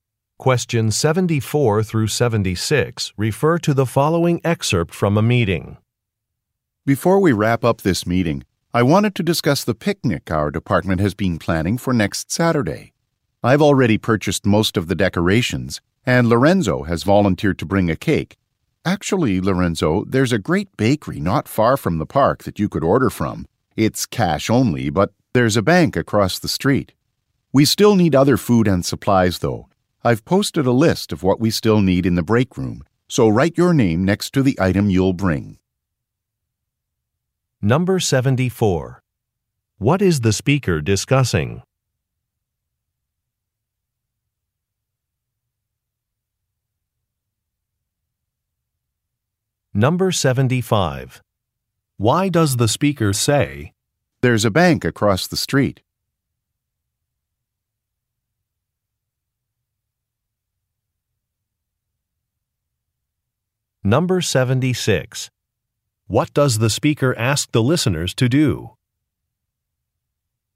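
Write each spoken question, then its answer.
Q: What is the speaker discussing?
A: A department picnic

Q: Why does the speaker say,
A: So Lorenzo can get cash to pay at the cash-only bakery

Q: What does the speaker ask the listeners to do?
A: Sign up on the list in the break room for an item to bring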